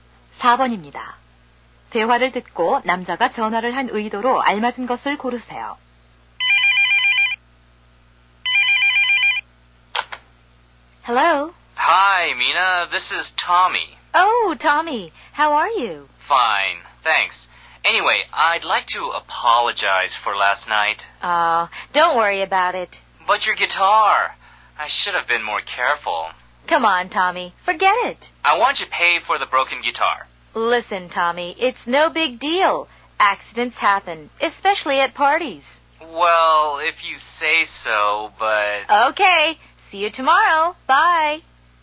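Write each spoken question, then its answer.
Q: 대화를 듣고 남자가 전화를 한 의도로 알맞은 것을 고르세요.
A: 사과하기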